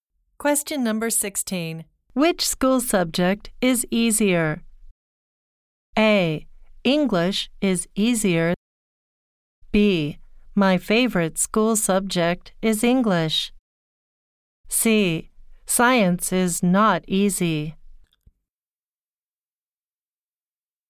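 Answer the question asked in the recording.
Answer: A: English is easier.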